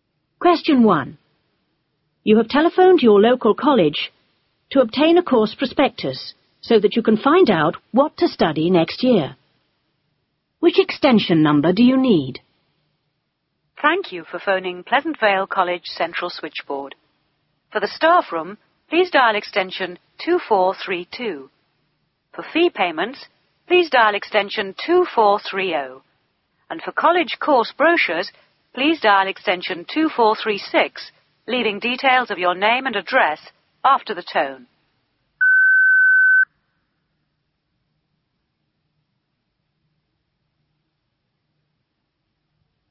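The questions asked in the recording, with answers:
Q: Which extension number do you need?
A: 2436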